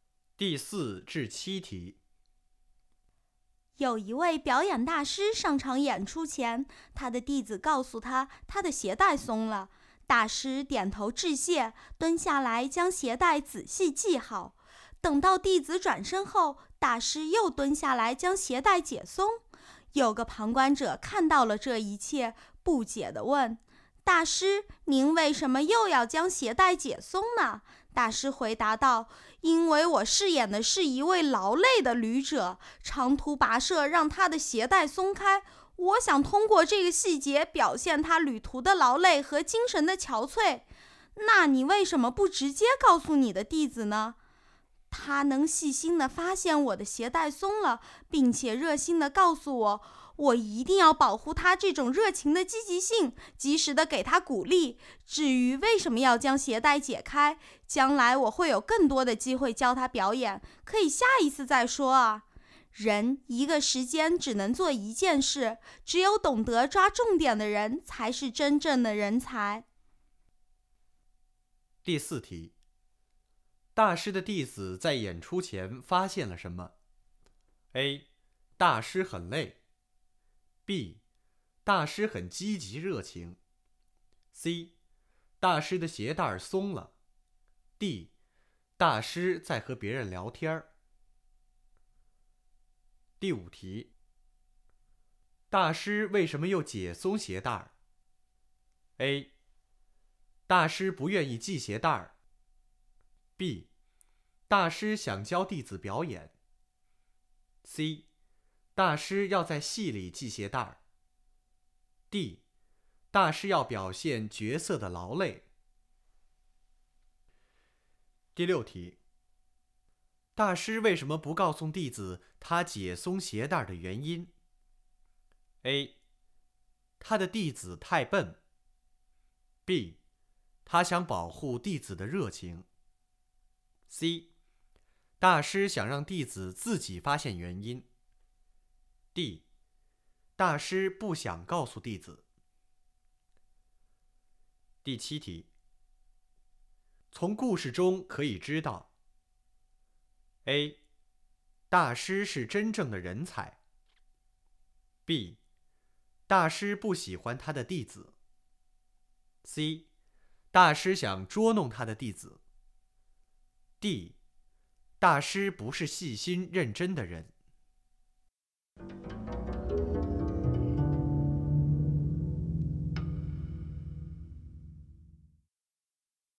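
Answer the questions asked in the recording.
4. C: 大师的鞋带松了。
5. D: 大师要表现角色的劳累。
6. B: 他想保护弟子的热情。
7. A: 大师是真正的人才。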